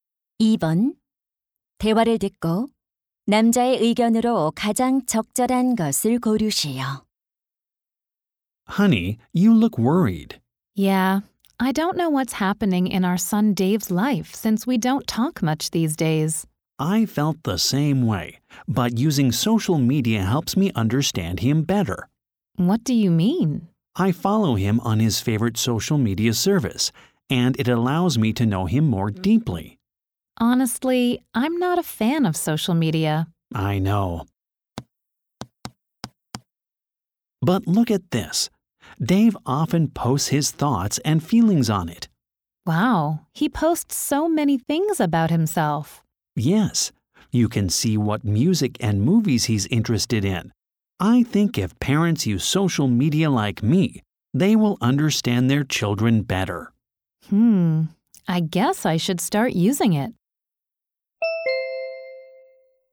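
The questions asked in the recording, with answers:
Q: 대화를 듣고 남자의 의견으로 가장 적절한 것을 고르시오.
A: 부모가 소셜 미디어를 이용하면 자녀를 더 잘 이해할 수 있다.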